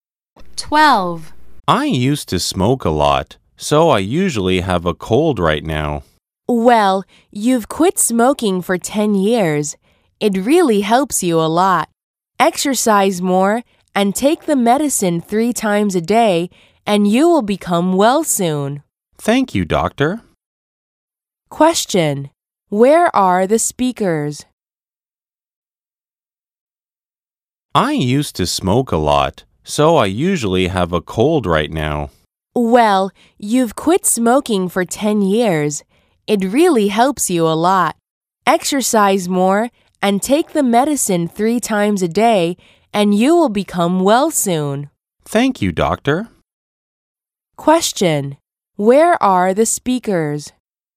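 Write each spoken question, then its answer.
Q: Where are the speakers?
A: At a doctor's office (clinic)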